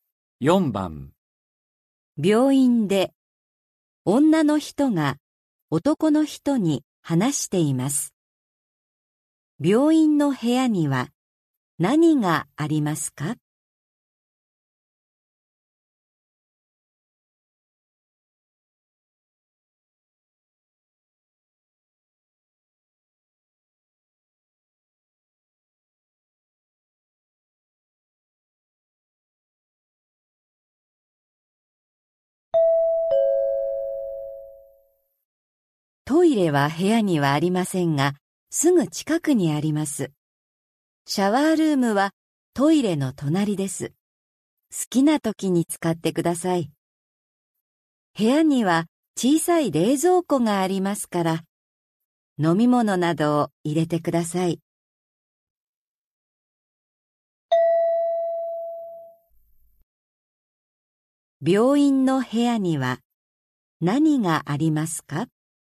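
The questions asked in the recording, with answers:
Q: 病院の部屋には何がありますか?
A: 小さい冷蔵庫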